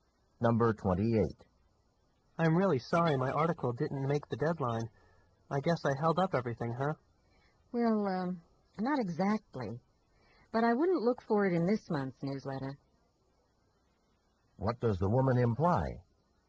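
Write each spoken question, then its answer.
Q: What does the woman imply?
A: The article won't be in this month's newsletter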